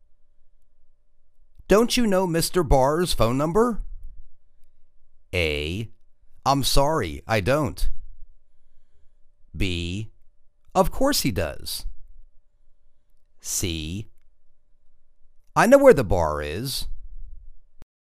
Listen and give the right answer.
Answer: I' m sorry; I don't.